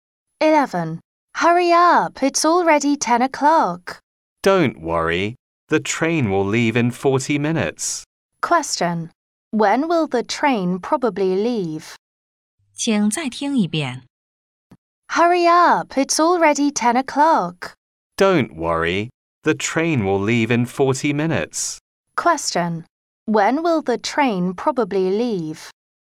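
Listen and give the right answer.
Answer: At 10:40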